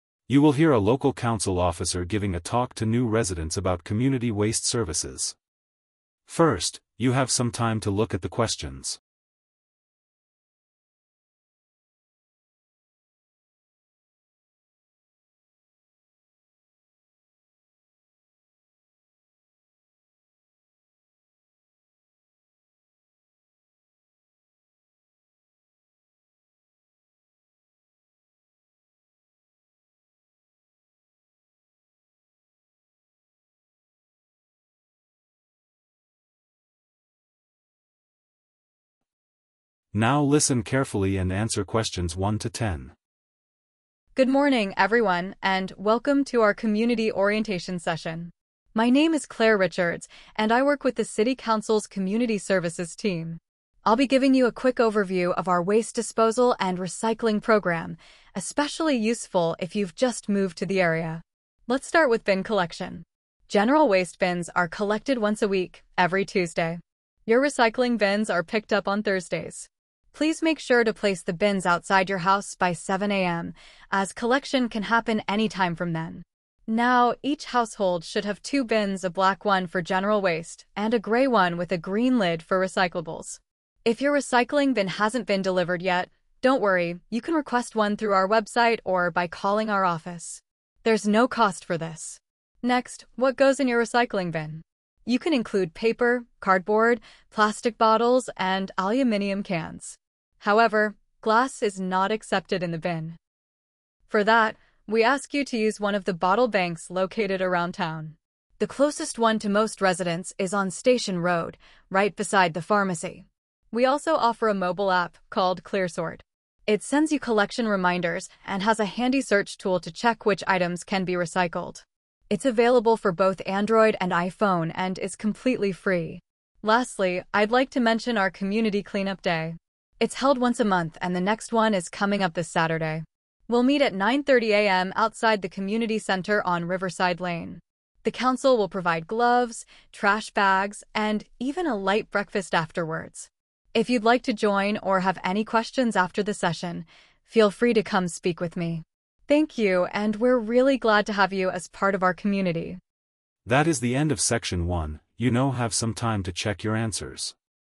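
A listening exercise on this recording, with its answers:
Complete the form below. Type ONE WORD AND/OR A NUMBER for each answer.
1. General waste collected on:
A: Tuesday

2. Recycling bins collected on:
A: Thursday

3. Bins should be out by:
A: 7

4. Grey bin with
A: green

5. No extra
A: cost

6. Accepted items: paper, cardboard, plastic bottles, and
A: aluminium cans

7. Glass must be taken to the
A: bottle

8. Nearest location: beside the pharmacy on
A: Station

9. ClearSort – free mobile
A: app

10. Clean-Up Day on Saturday at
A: 9:30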